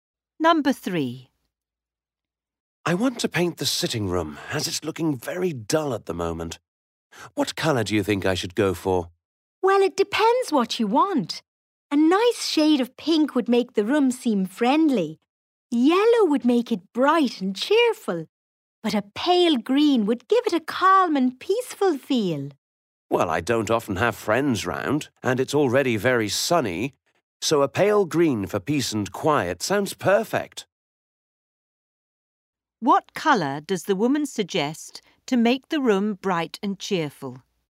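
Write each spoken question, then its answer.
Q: What colour does the woman suggest to make the room bright and cheerful?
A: Yellow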